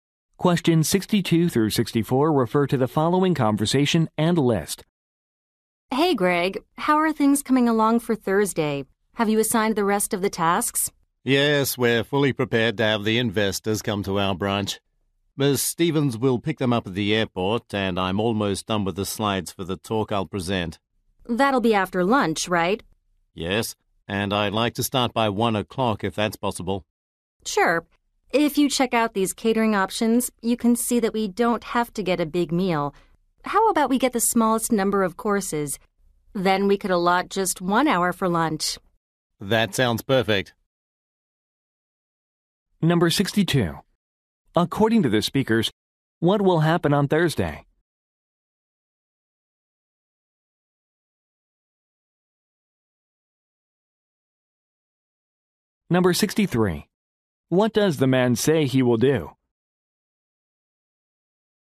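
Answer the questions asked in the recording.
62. Investors will visit the branch
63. Give a presentation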